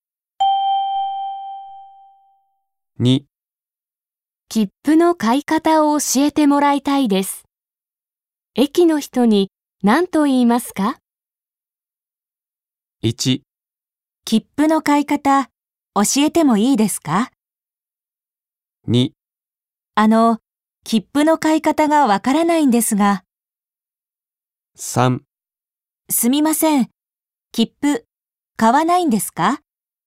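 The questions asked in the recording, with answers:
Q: 切符の買い方を教えてもらいたいです。駅の人に何と言いますか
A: 2: 切符の買い方がわからないんですが。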